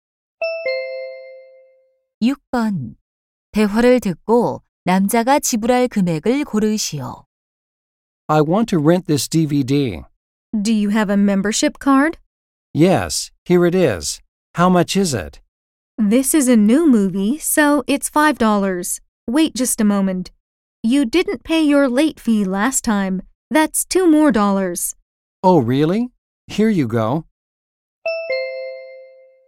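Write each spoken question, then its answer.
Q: 대화를 듣고 남자가 지불할 금액을 고르시오.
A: 7달러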